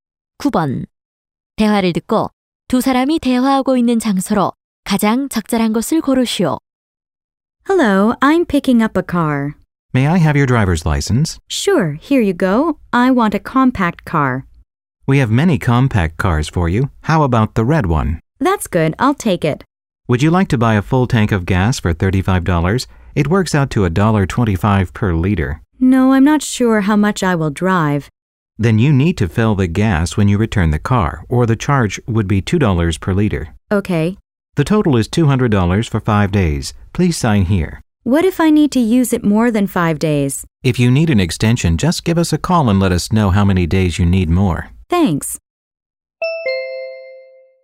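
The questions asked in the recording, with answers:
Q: 대화를 듣고 두 사람이 대화하고 있는 장소로 가장 적절한 곳을 고르시오.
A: 렌터카 회사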